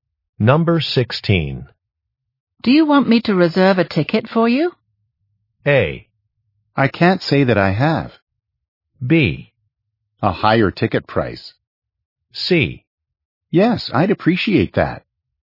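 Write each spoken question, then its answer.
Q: Do you want me to reserve a ticket for you?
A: C: Yes, I'd appreciate that.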